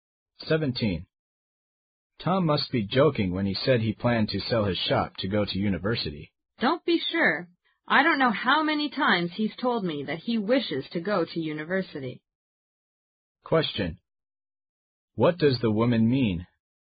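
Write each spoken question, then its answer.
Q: What does the woman mean?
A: Tom may really mean it; he has often said he wants to go to university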